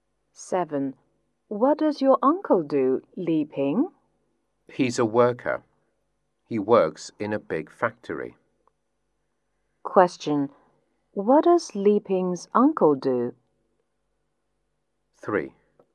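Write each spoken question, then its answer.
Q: What does Li Ping's uncle do?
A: He's a worker in a big factory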